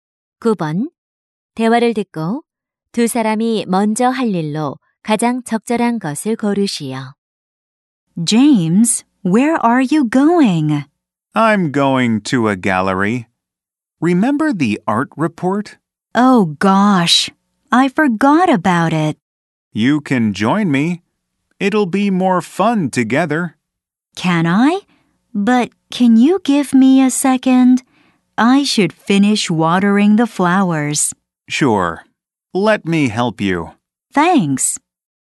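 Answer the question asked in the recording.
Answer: 꽃에 물 주기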